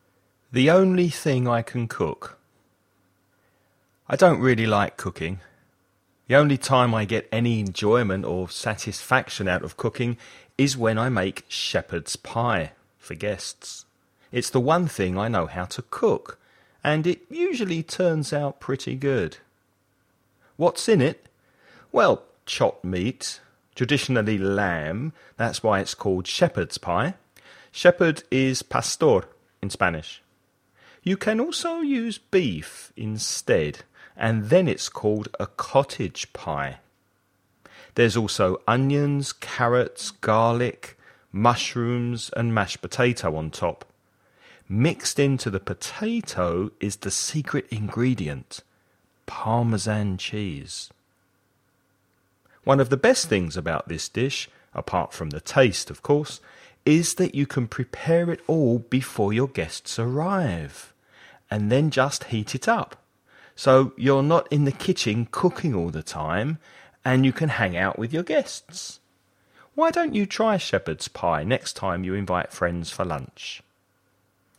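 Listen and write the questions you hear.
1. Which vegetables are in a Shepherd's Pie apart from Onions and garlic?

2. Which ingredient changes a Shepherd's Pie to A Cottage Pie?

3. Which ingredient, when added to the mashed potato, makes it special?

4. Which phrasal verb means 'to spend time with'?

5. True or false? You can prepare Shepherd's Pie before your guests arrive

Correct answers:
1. Carrots and mushrooms
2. Beef instead of lamb
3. Parmesan cheese
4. hang out
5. True

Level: nivel intermedio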